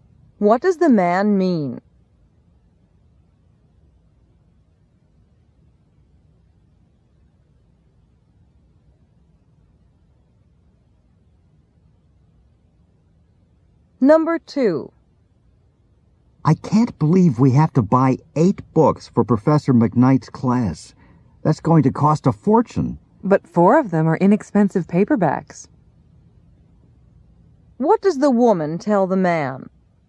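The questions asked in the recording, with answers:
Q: What does the woman tell the man?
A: Four of the books are cheap paperbacks, so it won't cost that much.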